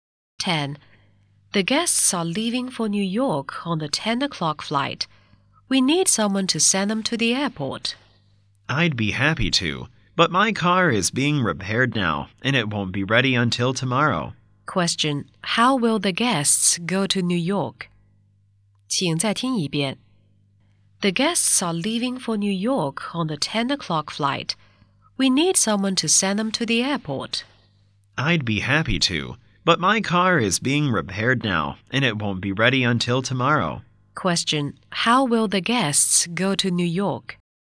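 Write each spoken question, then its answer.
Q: How will the guests go to New York?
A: By plane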